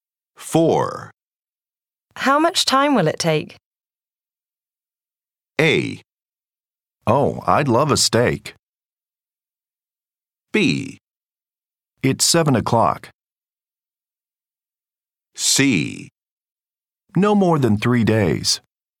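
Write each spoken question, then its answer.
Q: How much time will it take?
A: C: No more than 3 days.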